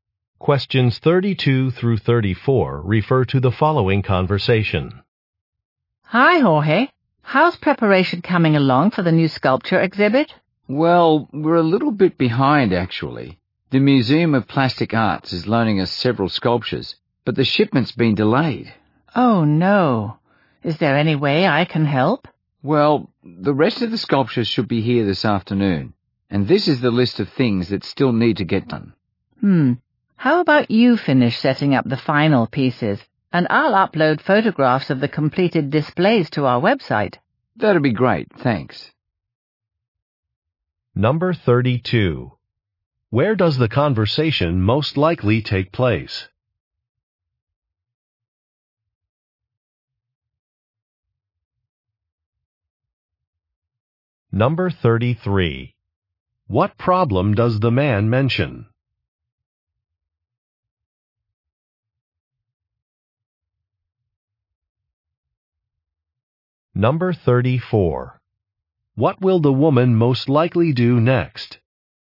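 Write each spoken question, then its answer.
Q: Where does the conversation most likely take place?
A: At a museum

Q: What problem does the man mention?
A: A shipment of sculptures has been delayed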